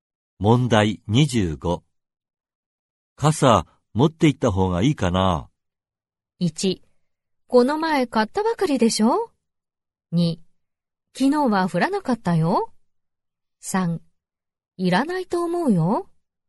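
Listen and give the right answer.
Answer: 3: いらないと思うよ。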